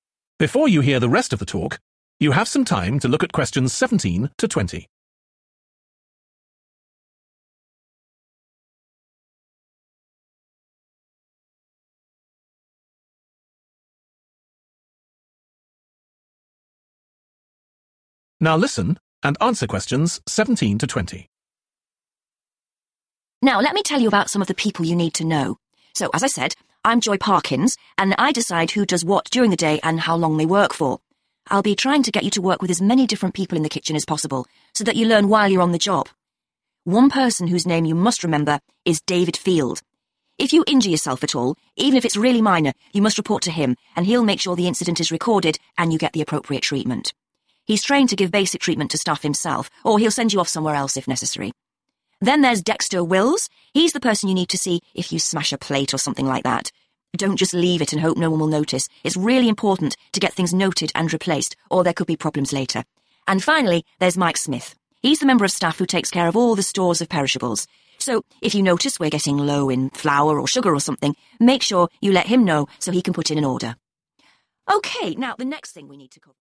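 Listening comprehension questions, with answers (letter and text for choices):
Choose FOUR answers from the box and write the correct letter, A-F, next to Questions 17-20.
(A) training courses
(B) food stocks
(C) first aid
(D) breakages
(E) staff discounts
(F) timetables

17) Joy Parkins .............................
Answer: (F) timetables

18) David Field ...............................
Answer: (C) first aid

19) Dexter Wills ..............................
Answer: (D) breakages

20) Mike Smith ..............................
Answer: (B) food stocks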